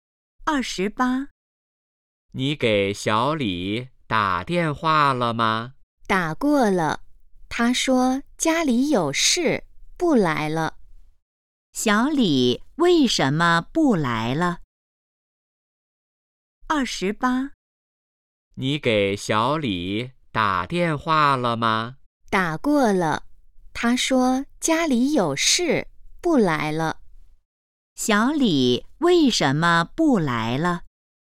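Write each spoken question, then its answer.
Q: 小李为什么不来了?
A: 家里有事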